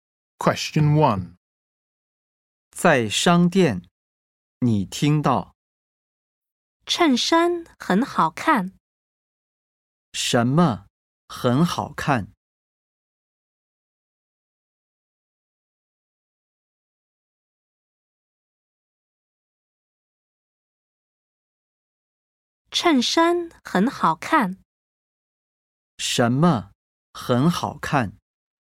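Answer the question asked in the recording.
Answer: 衬衫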